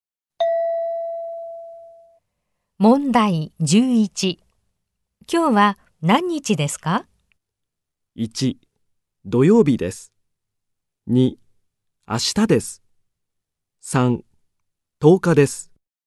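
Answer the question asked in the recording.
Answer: 3: 10日です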